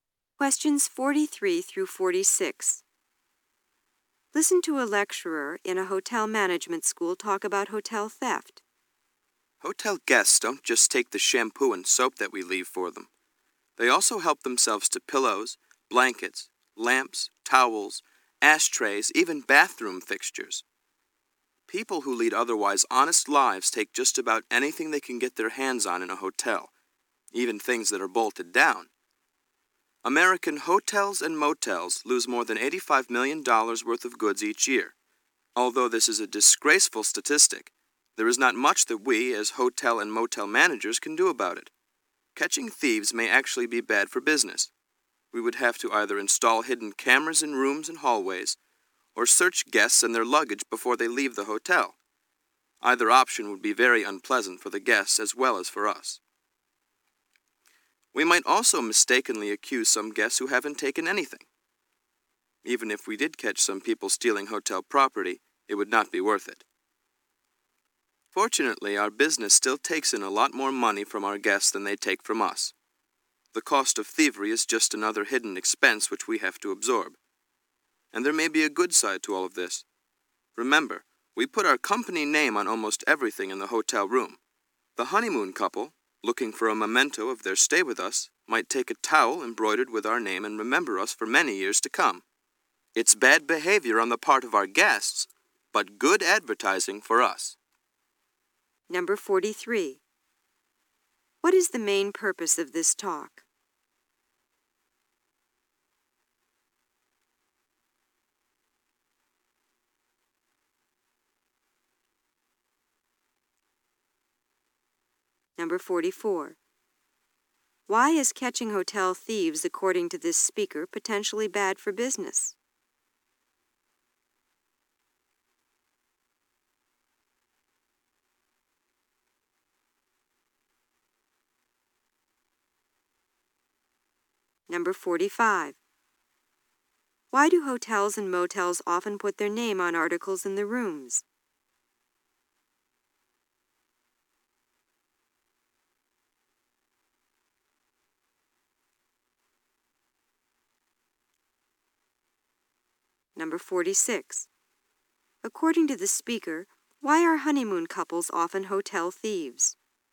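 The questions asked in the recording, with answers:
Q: What is the main purpose of this talk?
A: To discuss theft by hotel guests

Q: Why is catching hotel thieves, according to this speaker, potentially bad for business?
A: It would be unpleasant for guests and innocent guests might be accused

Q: According to the speaker, why are honeymoon couples often hotel thieves?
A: They want a souvenir of their stay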